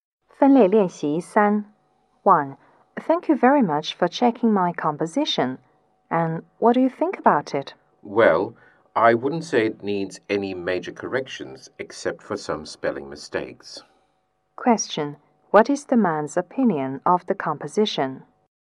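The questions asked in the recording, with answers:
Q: what is the man's opinion of the composition?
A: It's good, with only some spelling mistakes to correct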